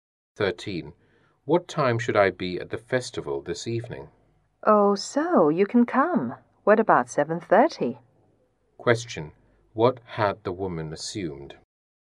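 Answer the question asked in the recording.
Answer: That the man couldn't come to the festival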